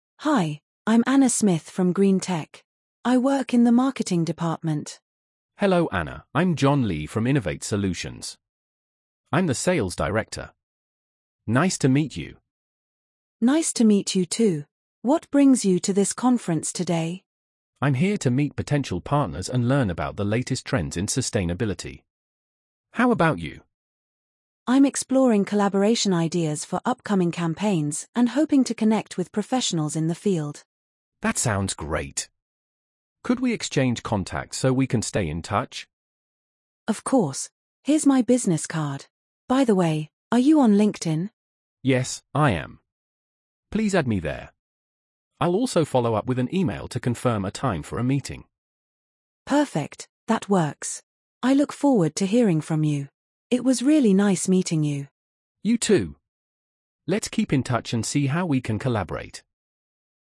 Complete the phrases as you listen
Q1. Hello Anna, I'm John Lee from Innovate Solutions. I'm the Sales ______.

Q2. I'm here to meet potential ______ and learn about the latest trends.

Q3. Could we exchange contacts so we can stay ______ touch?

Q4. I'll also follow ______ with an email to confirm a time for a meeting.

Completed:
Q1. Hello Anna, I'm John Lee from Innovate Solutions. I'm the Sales Director.
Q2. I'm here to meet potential partners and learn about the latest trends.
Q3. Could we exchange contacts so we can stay in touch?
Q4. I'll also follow up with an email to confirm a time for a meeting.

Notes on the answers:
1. Hello Anna, I'm John Lee from Innovate Solutions. I'm the Sales Director.
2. I'm here to meet potential partners and learn about the latest trends.
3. Could we exchange contacts so we can stay in touch?
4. I'll also follow up with an email to confirm a time for a meeting.

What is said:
Anna:
"Hi, I'm Anna Smith from GreenTech. I work in the marketing department."
John:
"Hello Anna, I'm John Lee from Innovate Solutions. I'm the Sales Director. Nice to meet you."
Anna:
"Nice to meet you too! What brings you to this conference today?"
John:
"I'm here to meet potential partners and learn about the latest trends in sustainability. How about you?"
Anna:
"I'm exploring collaboration ideas for upcoming campaigns and hoping to connect with professionals in the field."
John:
"That sounds great! Could we exchange contacts so we can stay in touch?"
Anna:
"Of course! Here's my business card. By the way, are you on LinkedIn?"
John:
"Yes, I am. Please add me there. I'll also follow up with an email to confirm a time for a meeting."
Anna:
"Perfect, that works. I look forward to hearing from you. It was really nice meeting you."
John:
"You too! Let's keep in touch and see how we can collaborate."
Perfect!